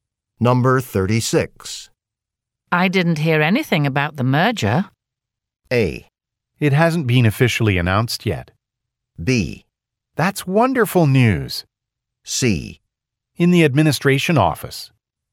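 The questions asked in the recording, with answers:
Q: I didn't hear anything about the merger.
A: A: It hasn't been officially announced yet.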